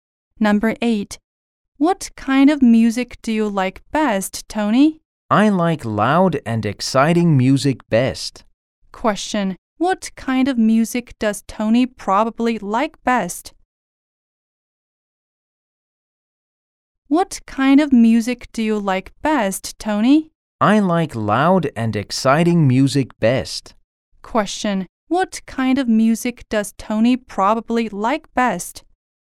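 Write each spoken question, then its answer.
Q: What kind of music does Tony probably like best?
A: Loud and exciting music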